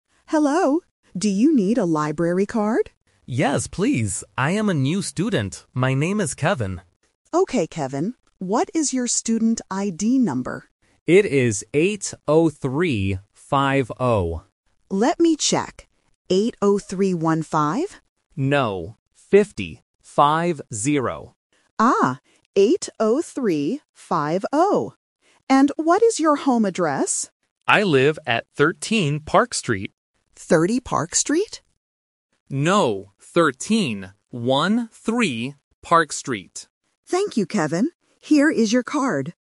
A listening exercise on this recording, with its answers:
Listen to the conversation between a librarian and a student. Circle the correct answer for each question.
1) What does the student want to get?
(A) A library card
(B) A student ID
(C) A credit card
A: A library card

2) What is Kevin's student ID number?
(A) 80315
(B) 80350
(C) 80530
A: 80350

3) What is Kevin's home address?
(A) 13 Park Street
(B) 30 Park Street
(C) 13 Dark Street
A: 13 Park Street

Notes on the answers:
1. The librarian asks, "Do you need a library card?" and Kevin says "Yes." Option (B) A student ID is the trap because the librarian asks for his "student ID number", but he already has it and is not making a new one. Option (C) A credit card is not mentioned.
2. Kevin says his number is "8-0-3-5-0" and clarifies with "Five-zero". Option (A) 80315 is the trap because the librarian mishears it as 15 (fifteen sounds like fifty). Option (C) 80530 is a plausible mix-up but is never mentioned.
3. Kevin says he lives at "13 Park Street" and repeats "One-three." Option (B) 30 Park Street is the trap because the librarian mishears "13" as "30" (thirteen vs thirty). Option (C) is a plausible sounding street but is not mentioned.

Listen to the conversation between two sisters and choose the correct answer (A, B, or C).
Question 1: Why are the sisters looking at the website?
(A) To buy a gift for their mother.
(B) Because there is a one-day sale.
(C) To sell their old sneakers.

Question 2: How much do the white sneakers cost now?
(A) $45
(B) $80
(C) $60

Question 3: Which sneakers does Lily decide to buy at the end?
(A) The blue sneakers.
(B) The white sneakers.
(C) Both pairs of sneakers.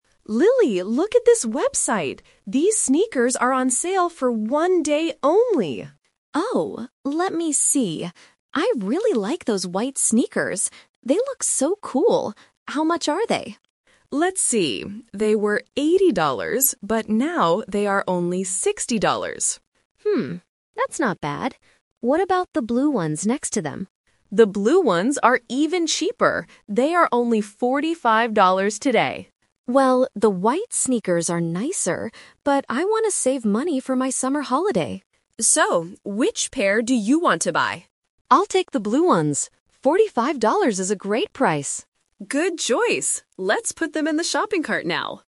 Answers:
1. Because there is a one-day sale.
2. $60
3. The blue sneakers.

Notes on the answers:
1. Emma says "These sneakers are on sale for one day only" right at the beginning. Options (A) and (C) are not mentioned in the dialogue.
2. Emma mentions two prices for the white sneakers: $80 (the old price - "they were eighty dollars") and $60 (the current price - "now they are only sixty dollars"). Option (A) is the price of the blue sneakers.
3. This is "The Twist". Lily says she likes the white ones because they are "nicer," but then she says "BUT I want to save money" and finally chooses the blue ones because they are the "great price" ($45). Option (B) is what she liked initially but rejected. Option (C) is incorrect because she only chooses one pair.

